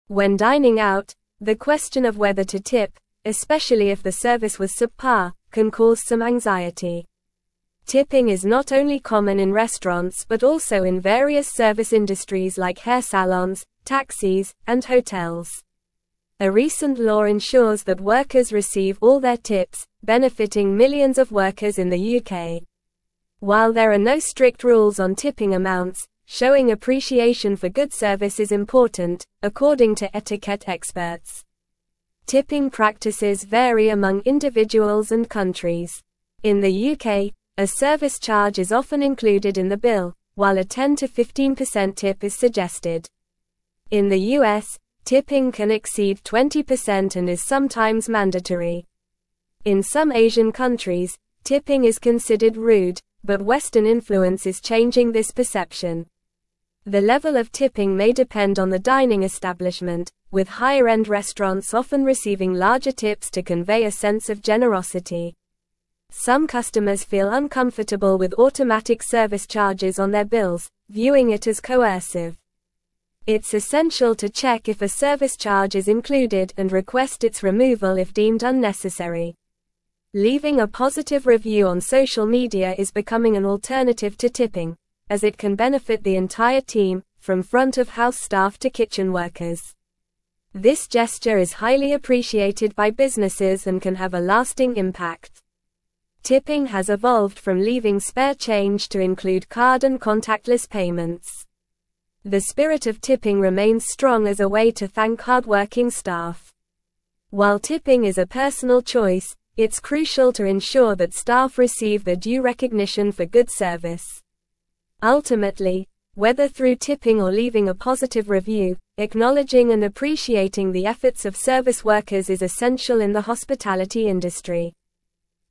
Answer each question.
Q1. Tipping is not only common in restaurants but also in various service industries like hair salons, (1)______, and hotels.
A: taxis

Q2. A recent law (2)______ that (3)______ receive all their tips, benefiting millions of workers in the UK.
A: ensures

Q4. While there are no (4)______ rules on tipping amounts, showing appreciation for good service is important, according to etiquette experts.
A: strict

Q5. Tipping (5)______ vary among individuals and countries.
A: practices

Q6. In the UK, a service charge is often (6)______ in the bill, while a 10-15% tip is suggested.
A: included

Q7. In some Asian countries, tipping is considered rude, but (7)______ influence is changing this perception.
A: Western

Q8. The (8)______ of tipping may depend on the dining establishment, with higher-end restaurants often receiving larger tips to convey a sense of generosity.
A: level

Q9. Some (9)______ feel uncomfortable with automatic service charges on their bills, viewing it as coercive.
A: customers

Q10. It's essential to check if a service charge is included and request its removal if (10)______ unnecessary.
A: deemed

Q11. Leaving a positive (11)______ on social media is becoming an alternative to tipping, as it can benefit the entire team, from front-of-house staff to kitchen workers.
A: review

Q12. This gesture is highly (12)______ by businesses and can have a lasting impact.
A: appreciated

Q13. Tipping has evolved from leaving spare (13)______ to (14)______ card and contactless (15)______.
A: change

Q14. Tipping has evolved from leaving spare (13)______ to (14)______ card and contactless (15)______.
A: include

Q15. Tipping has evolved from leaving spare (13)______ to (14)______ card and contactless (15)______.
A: payments

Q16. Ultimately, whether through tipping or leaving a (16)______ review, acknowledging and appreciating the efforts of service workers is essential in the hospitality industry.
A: positive

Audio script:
When dining out, the question of whether to tip, especially if the service was subpar, can cause some anxiety. Tipping is not only common in restaurants but also in various service industries like hair salons, taxis, and hotels. A recent law ensures that workers receive all their tips, benefiting millions of workers in the UK. While there are no strict rules on tipping amounts, showing appreciation for good service is important, according to etiquette experts.
Tipping practices vary among individuals and countries. In the UK, a service charge is often included in the bill, while a 10-15% tip is suggested. In the US, tipping can exceed 20% and is sometimes mandatory. In some Asian countries, tipping is considered rude, but Western influence is changing this perception. The level of tipping may depend on the dining establishment, with higher-end restaurants often receiving larger tips to convey a sense of generosity.
Some customers feel uncomfortable with automatic service charges on their bills, viewing it as coercive. It's essential to check if a service charge is included and request its removal if deemed unnecessary. Leaving a positive review on social media is becoming an alternative to tipping, as it can benefit the entire team, from front-of-house staff to kitchen workers. This gesture is highly appreciated by businesses and can have a lasting impact.
Tipping has evolved from leaving spare change to include card and contactless payments. The spirit of tipping remains strong as a way to thank hardworking staff. While tipping is a personal choice, it's crucial to ensure that staff receive their due recognition for good service. Ultimately, whether through tipping or leaving a positive review, acknowledging and appreciating the efforts of service workers is essential in the hospitality industry.

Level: Level 4